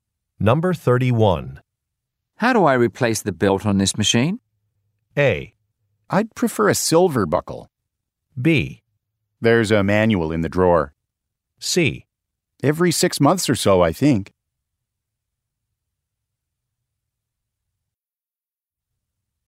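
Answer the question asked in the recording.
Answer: B: There's a manual in the drawer.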